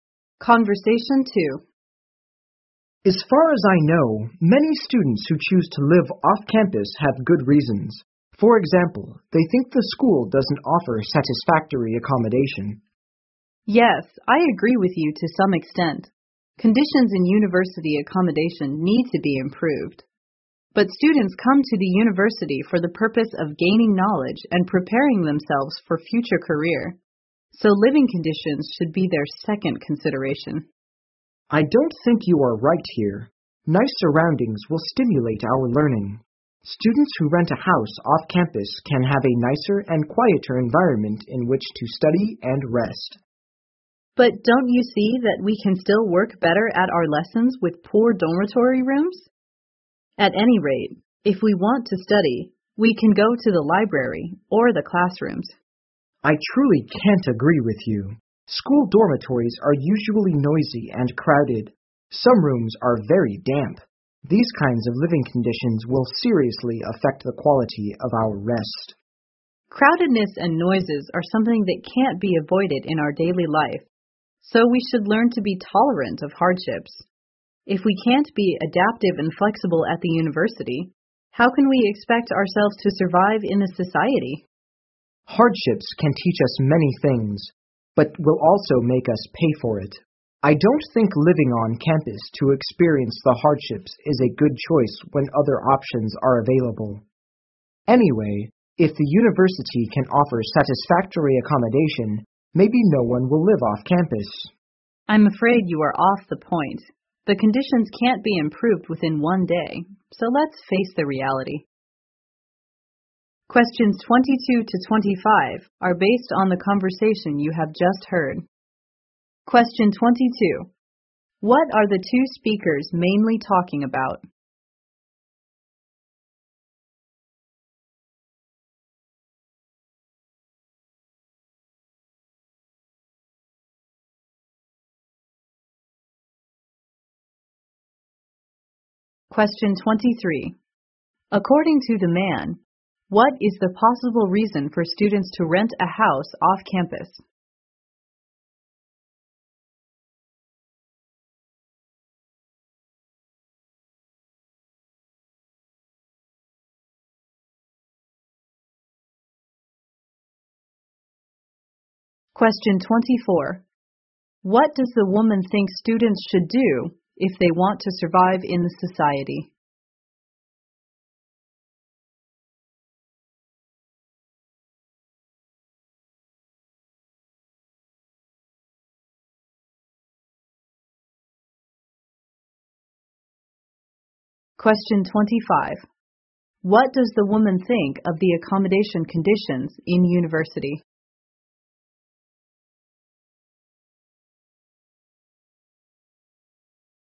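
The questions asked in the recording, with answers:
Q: What are the two speakers mainly talking about?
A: Whether students should live on or off campus.

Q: According to the man, what is the possible reason for students to rent a house off campus?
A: The school doesn't offer satisfactory accommodation.

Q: What does the woman think students should do if they want to survive in the society?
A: Be adaptive and flexible and tolerate hardships.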